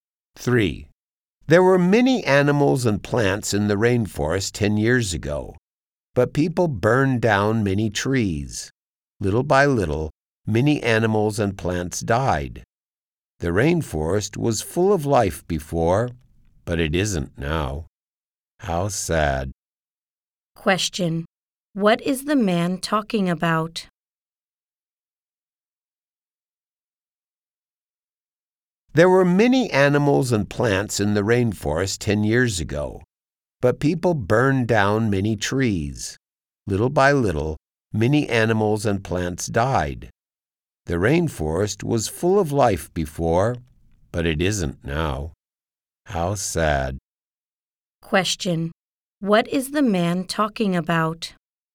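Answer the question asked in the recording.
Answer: The rainforest losing its animals and plants after people burned down trees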